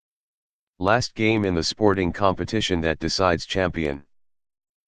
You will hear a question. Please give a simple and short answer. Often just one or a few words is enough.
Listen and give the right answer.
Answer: The Final